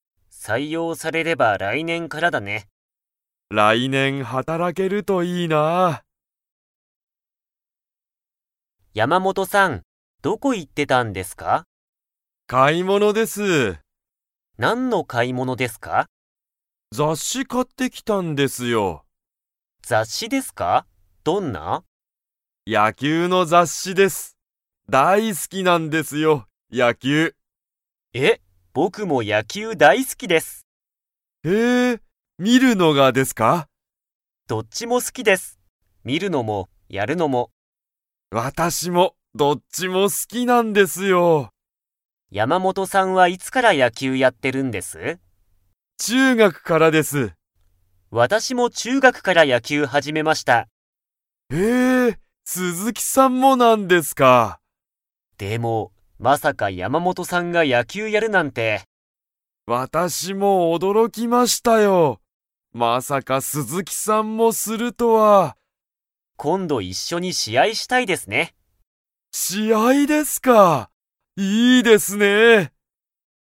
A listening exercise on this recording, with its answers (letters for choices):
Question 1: 山本やまもとさんは、何なにを買かいましたか?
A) 野球やきゅうのチケット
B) 雑誌ざっし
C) 新聞しんぶん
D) ご飯はん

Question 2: 鈴木すずきさんは、山本やまもとさんが野球やきゅうをやることを 。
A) 知しっていた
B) 知しらなかった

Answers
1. B
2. B

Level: Level 4